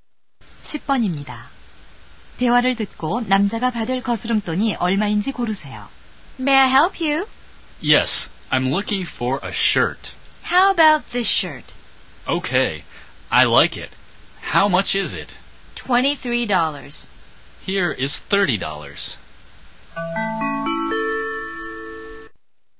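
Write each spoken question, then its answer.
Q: 대화를 듣고 남자가 받을 거스름돈이 얼마인지 고르세요.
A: 7달러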